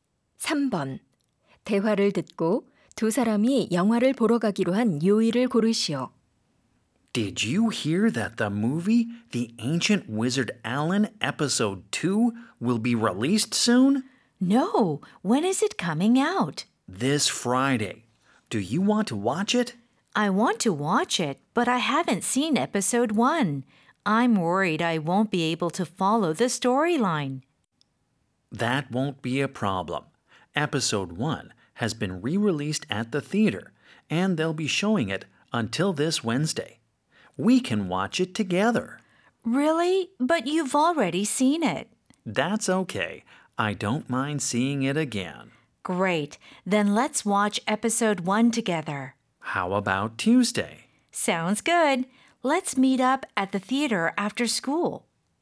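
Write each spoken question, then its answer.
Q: 대화를 듣고 두 사람이 영화를 보러 가기로 한 요일을 고르시오.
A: 화요일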